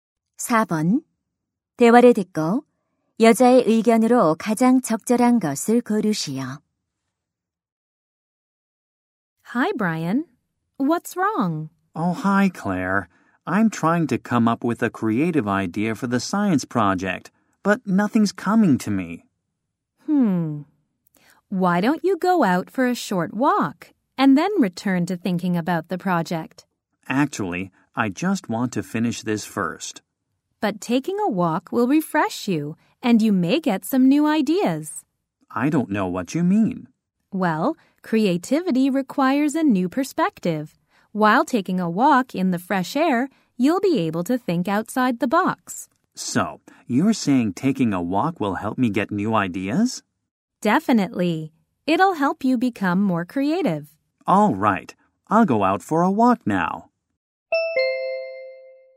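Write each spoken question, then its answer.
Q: 대화를 듣고 여자의 의견으로 가장 적절한 것을 고르시오.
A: 산책은 창의적인 아이디어를 얻는 데 도움이 된다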